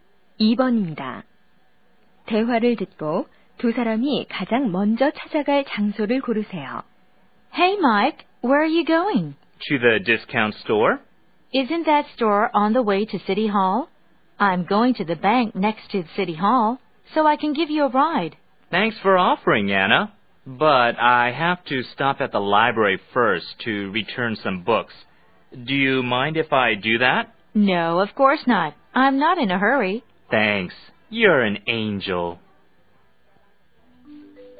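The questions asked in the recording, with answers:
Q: 대화를 듣고 두 사람이 가장 먼저 찾아갈 장소를 고르세요.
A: 도서관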